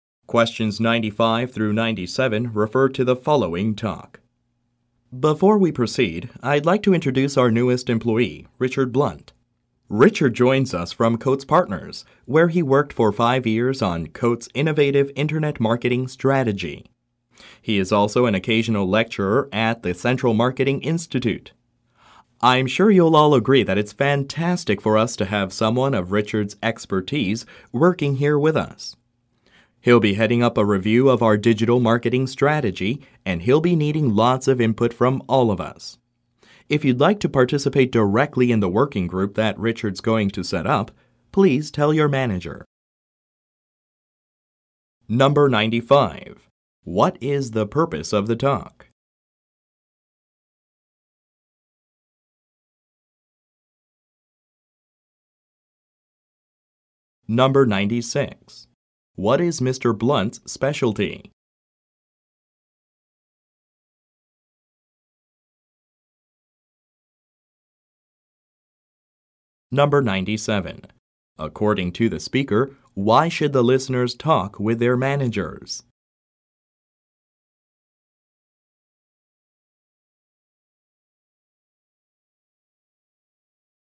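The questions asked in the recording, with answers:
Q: What is the purpose of the talk?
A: To introduce a new employee

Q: What is Mr. Blunt's specialty?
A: Internet (digital) marketing

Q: According to the speaker, why should the listeners talk with their managers?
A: To join Richard's working group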